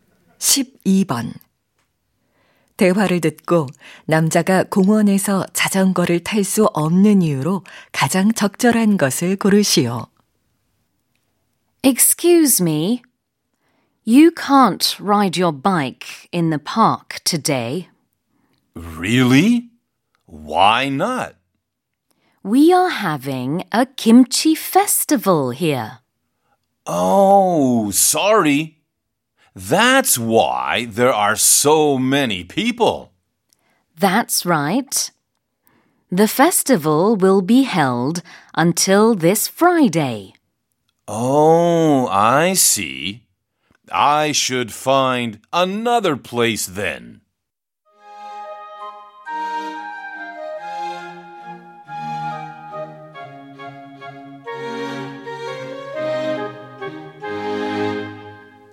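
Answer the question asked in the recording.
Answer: 공원에서 김치 축제가 열려서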